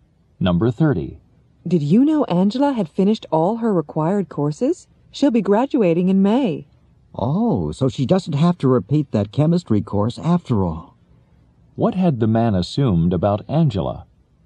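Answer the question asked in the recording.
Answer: That she had to repeat the chemistry course.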